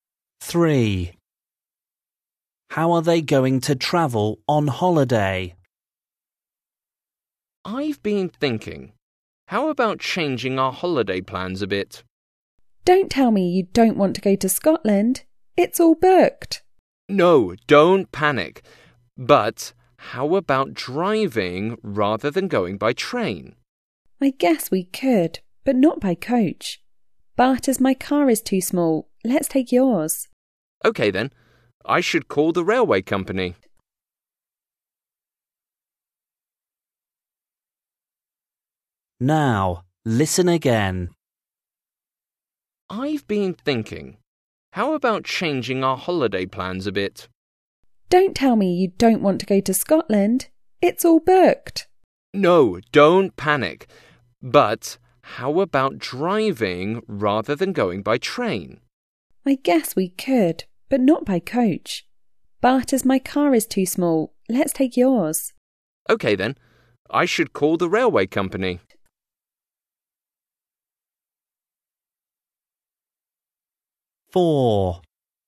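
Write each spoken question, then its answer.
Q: How are they going to travel on holiday?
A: by car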